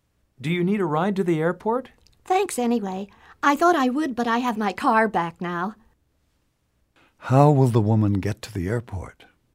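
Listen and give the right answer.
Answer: She will drive her own car.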